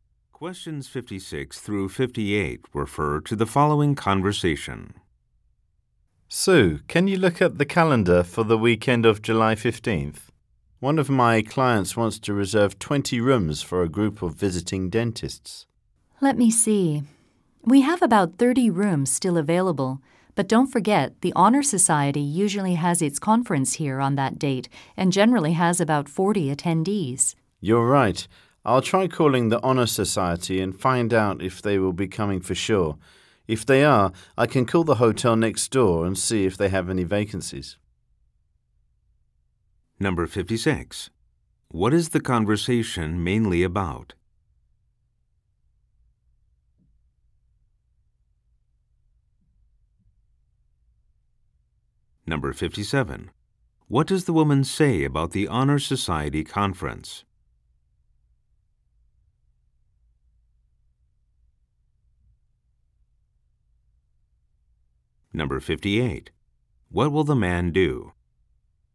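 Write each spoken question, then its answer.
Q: What is the conversation mainly about?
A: Reserving 20 hotel rooms for a group of dentists

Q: What does the woman say about the Honor Society conference?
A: It is usually held on that date with about 40 attendees

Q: What will the man do?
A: Call the Honor Society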